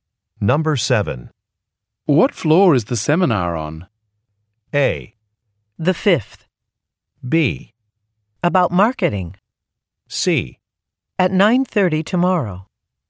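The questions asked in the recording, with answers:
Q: What floor is the seminar on?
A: A: The 5th.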